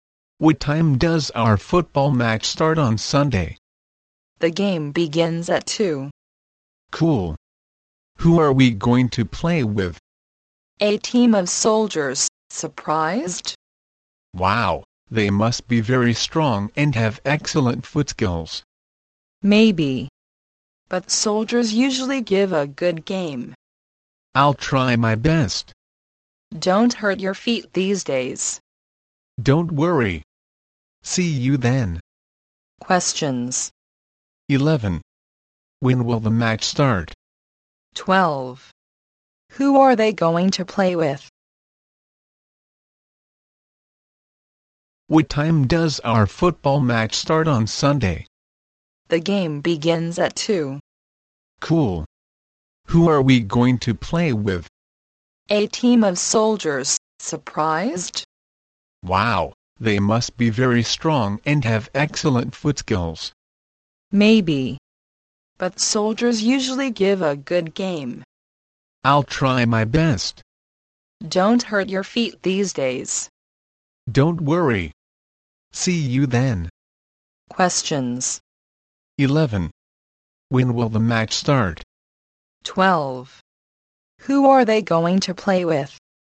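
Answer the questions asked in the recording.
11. At 2 on Sunday
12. A team of soldiers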